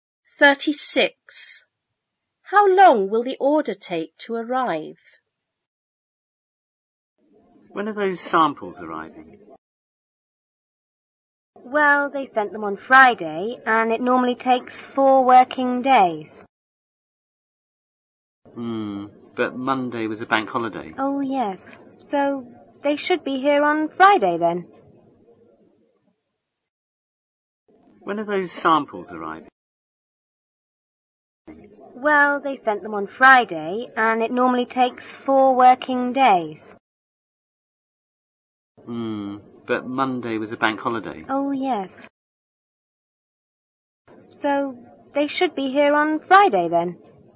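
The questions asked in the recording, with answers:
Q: How long will the order take to arrive?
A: It will arrive on Friday (a week after it was sent)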